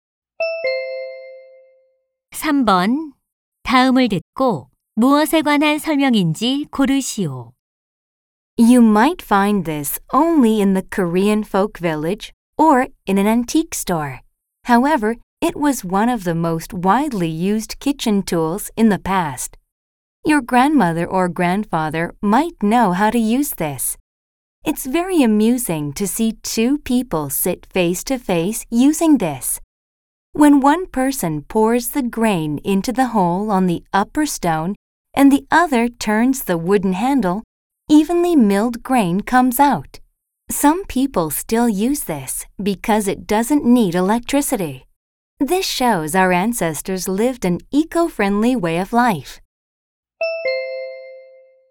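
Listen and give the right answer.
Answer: 맷돌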